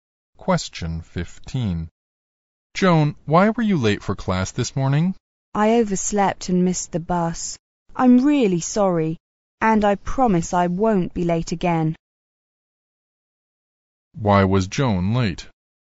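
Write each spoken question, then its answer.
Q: Why was Joan late?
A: She overslept and missed the bus.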